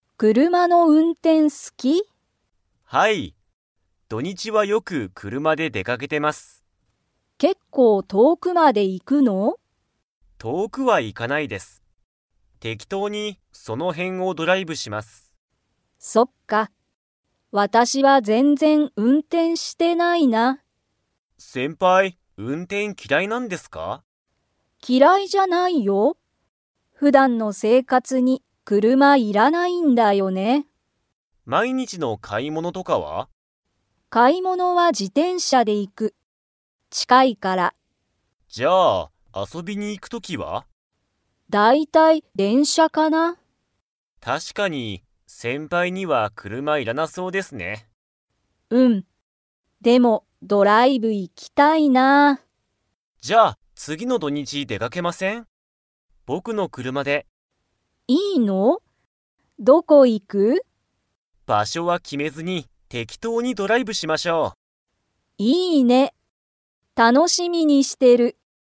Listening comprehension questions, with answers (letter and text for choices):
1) ゆかりは運転うんてんが嫌きらいですか?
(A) はい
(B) いいえ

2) ゆかりは、 で遊あそびに行いく。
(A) 車くるま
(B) 自転車じてんしゃ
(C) 電車でんしゃ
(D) バス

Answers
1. (B) いいえ
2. (C) 電車でんしゃ

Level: Level 4